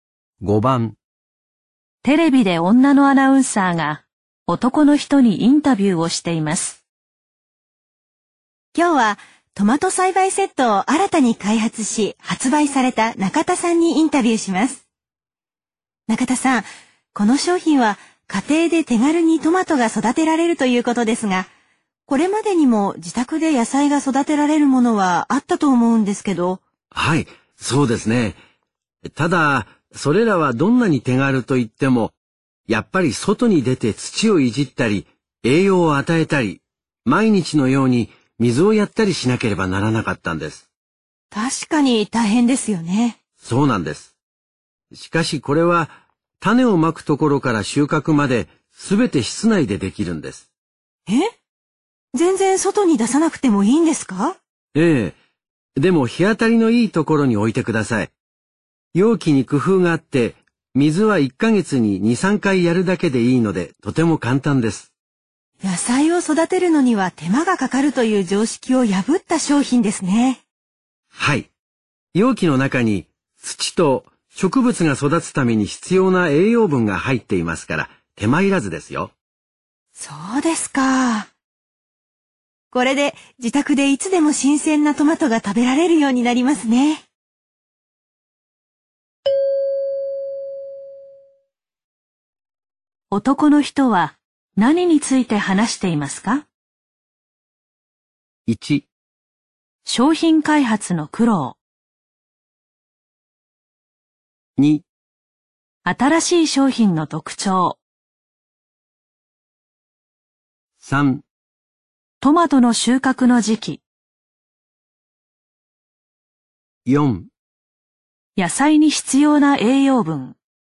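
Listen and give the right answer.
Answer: 2: 新しい商品の特徴。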